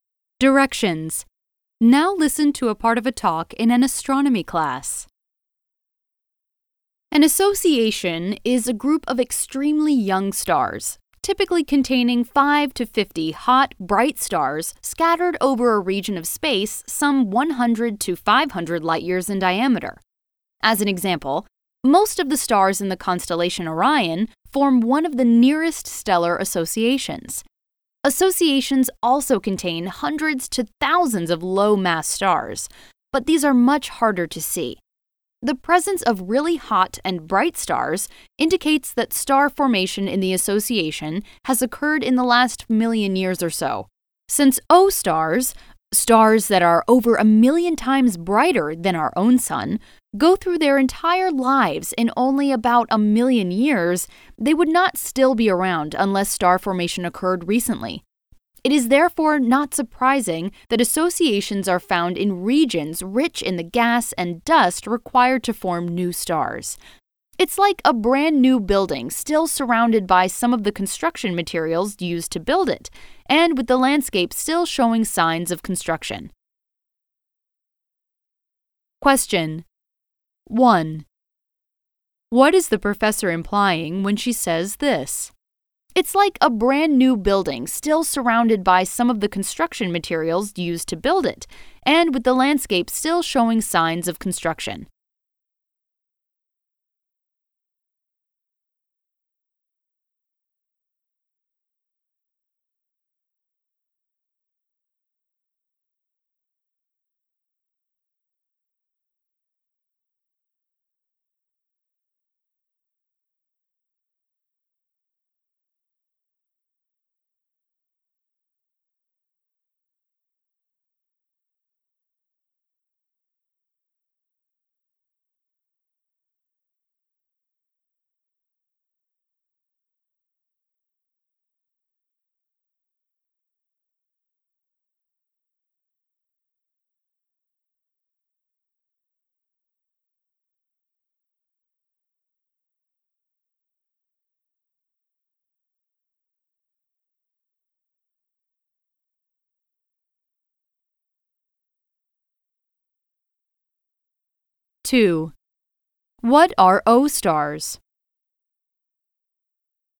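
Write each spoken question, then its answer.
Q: What are O stars?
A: Very hot, bright stars, over a million times brighter than the sun, that live only about a million years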